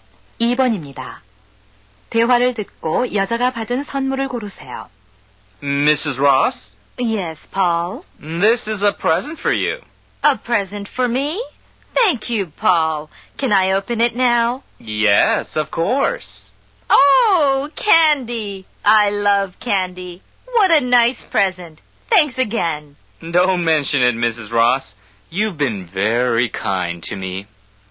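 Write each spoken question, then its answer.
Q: 대화를 듣고 여자가 받은 선물을 고르세요.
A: 사탕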